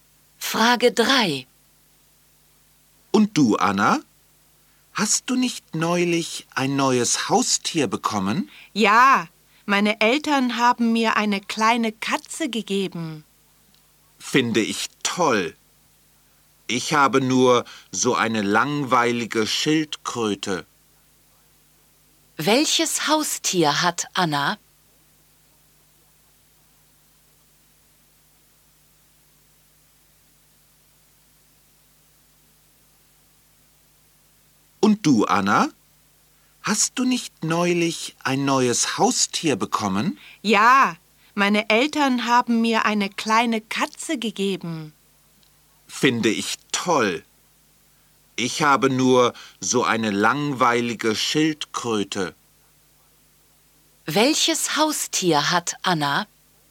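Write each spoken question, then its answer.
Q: Welches Haustier hat Anna?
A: Eine kleine Katze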